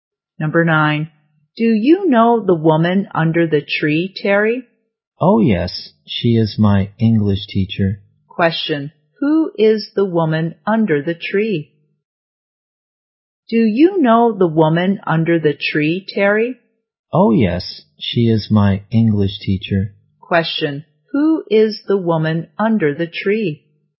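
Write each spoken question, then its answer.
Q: who is the woman under the tree?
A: Terry's English teacher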